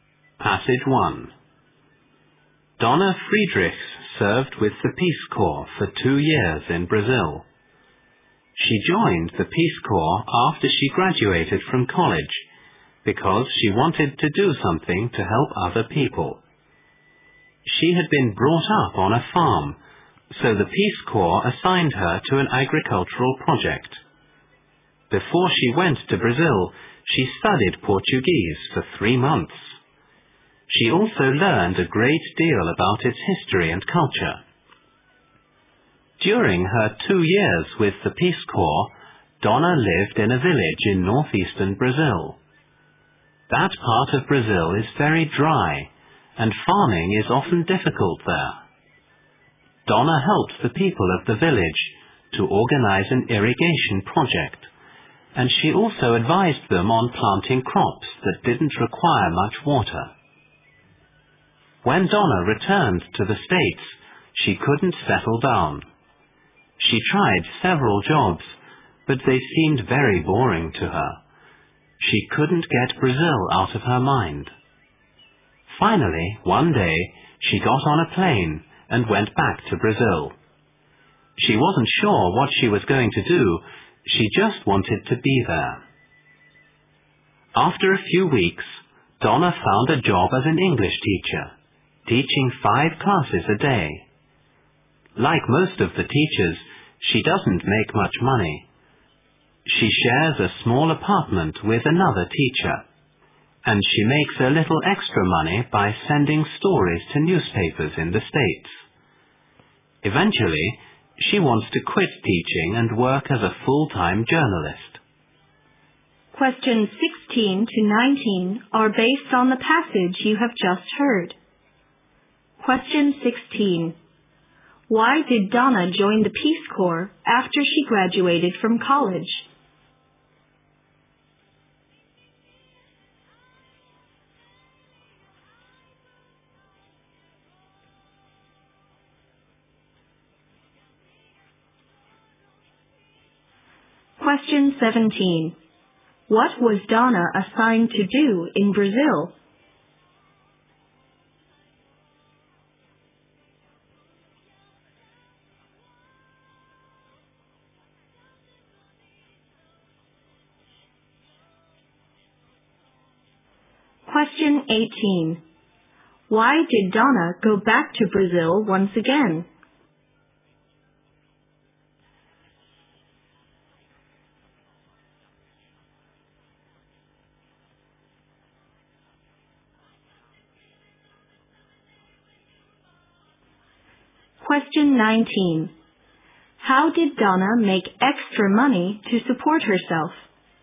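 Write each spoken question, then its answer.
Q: Why did Donna join the Peace Corps after she graduated from college?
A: She wanted to help other people

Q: What was Donna assigned to do in Brazil?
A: Work on an agricultural project

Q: Why did Donna go back to Brazil once again?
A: She couldn't get Brazil out of her mind and found jobs at home boring

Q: How did Donna make extra money to support herself?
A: By sending stories to newspapers in the States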